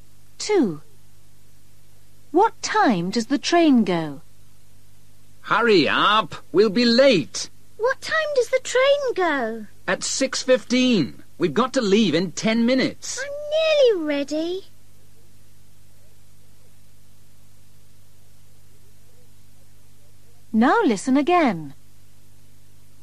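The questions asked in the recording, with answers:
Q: What time does the train go?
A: At 6:15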